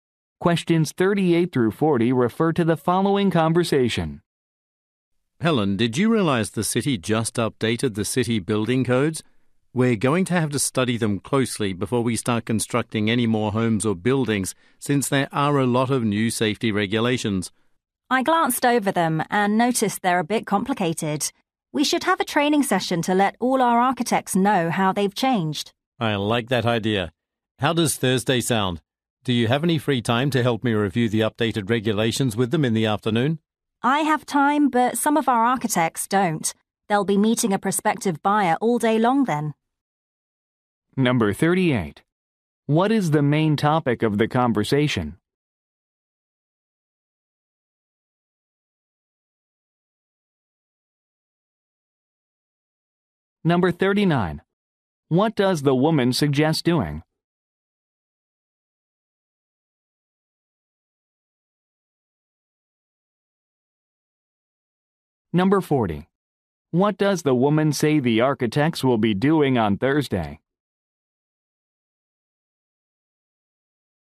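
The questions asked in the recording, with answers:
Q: What is the main topic of the conversation?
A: Updated city building codes

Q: What does the woman suggest doing?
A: Holding a training session for the architects

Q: What does the woman say the architects will be doing on Thursday?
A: Meeting a prospective buyer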